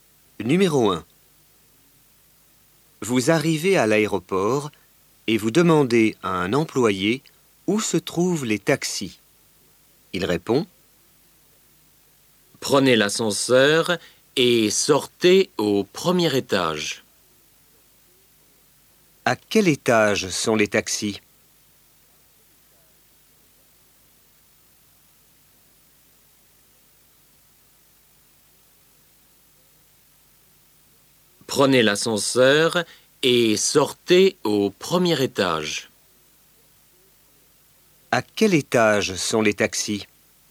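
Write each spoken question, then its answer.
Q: À quel étage sont les taxis?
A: Au premier étage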